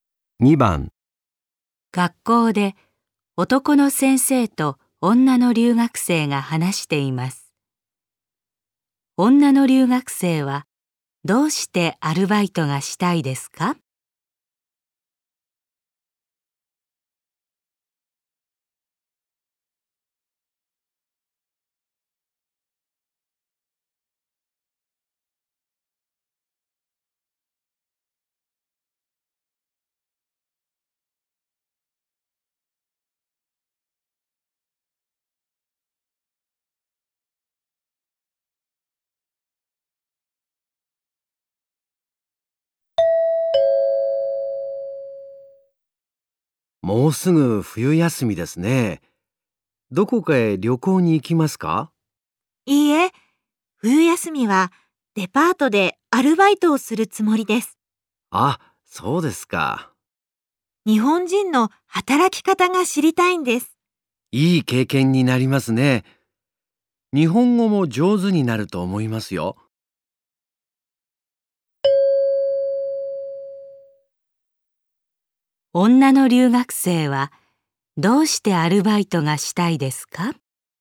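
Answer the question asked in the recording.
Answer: 日本人の働き方が知りたいから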